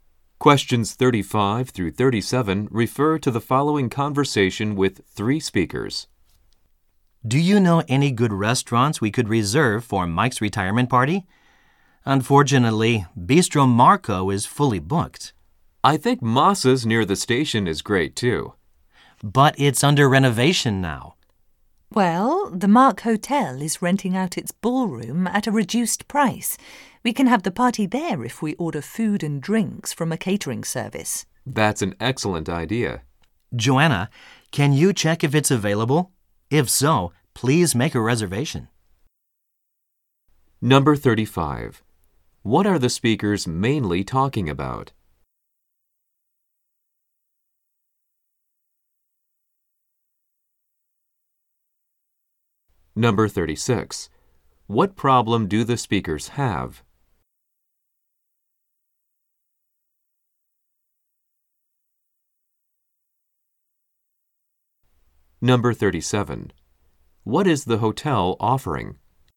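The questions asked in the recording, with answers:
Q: What are the speakers mainly talking about?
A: Where to hold Mike's retirement party

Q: What problem do the speakers have?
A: The restaurants they want are unavailable (one fully booked, one under renovation)

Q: What is the hotel offering?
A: Its ballroom for rent at a reduced price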